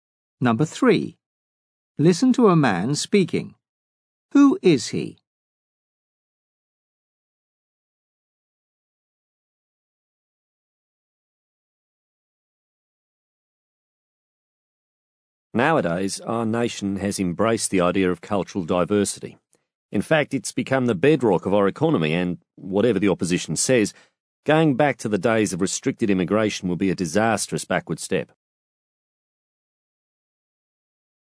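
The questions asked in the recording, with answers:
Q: Who is he?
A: A politician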